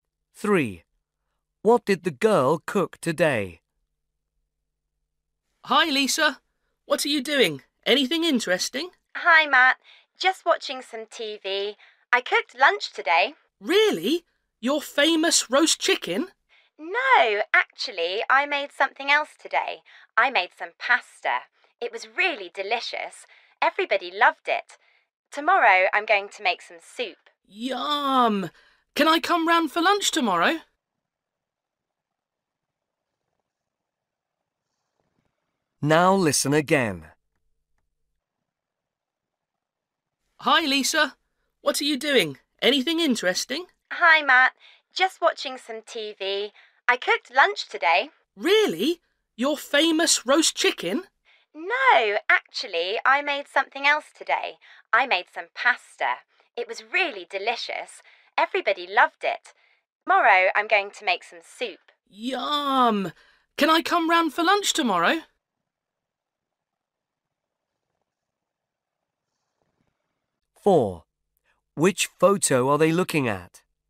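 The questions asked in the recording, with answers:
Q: What did the girl cook today?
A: pasta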